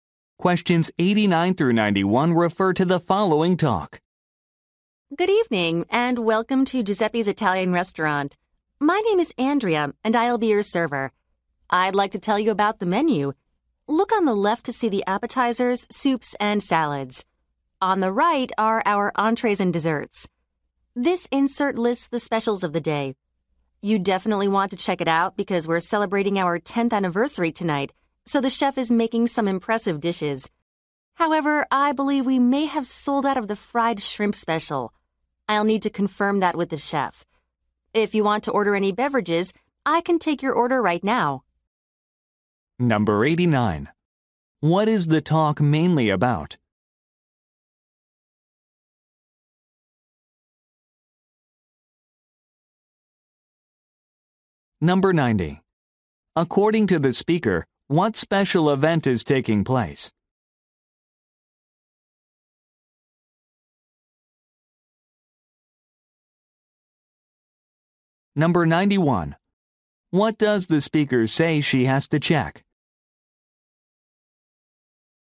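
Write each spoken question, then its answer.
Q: What is the talk mainly about?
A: The restaurant's menu

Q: According to the speaker, what special event is taking place?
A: The restaurant's 10th anniversary

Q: What does the speaker say she has to check?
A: Whether the fried shrimp special has sold out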